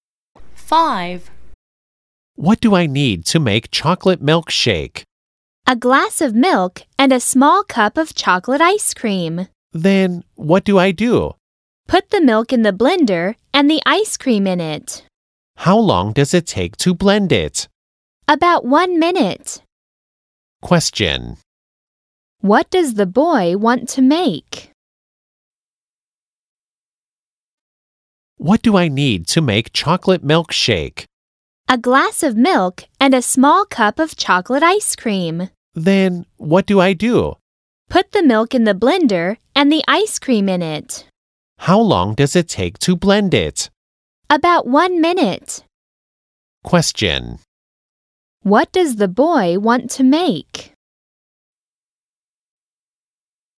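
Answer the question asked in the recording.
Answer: A chocolate milkshake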